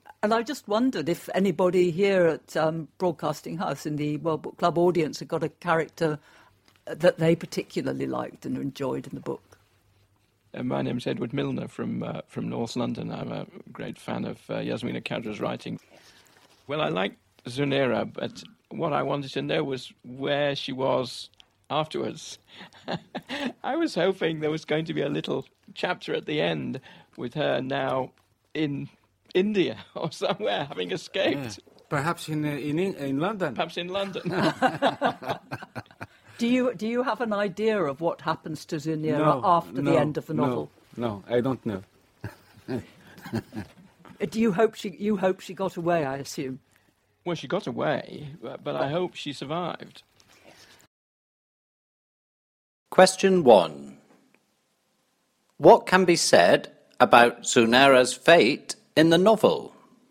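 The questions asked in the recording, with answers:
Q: What can be said about Zunera's fate in the novel?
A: She got away, but what happened to her afterwards is unknown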